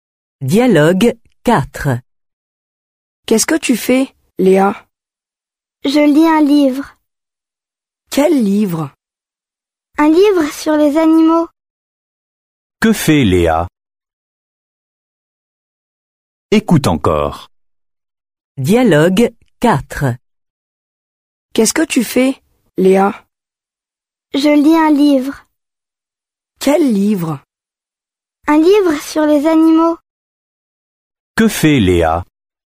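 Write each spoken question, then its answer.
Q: Que fait Léa?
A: Elle lit un livre sur les animaux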